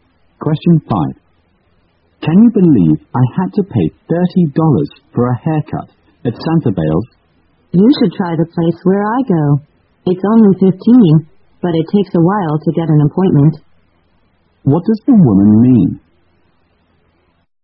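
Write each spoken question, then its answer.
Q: What does the woman mean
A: Her place charges only $15 for a haircut, but it's hard to get an appointment quickly.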